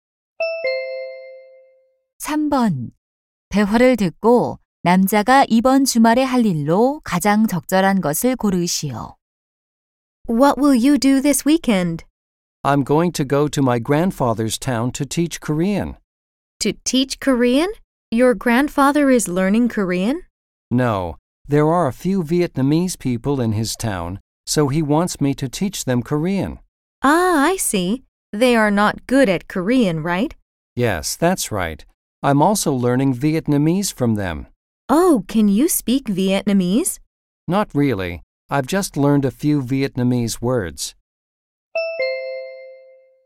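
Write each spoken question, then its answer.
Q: 대화를 듣고 남자가 이번 주말에 할 일로 가장 적절한 것을 고르시오.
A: 할아버지 마을에 가서 베트남 사람들에게 한국어 가르치기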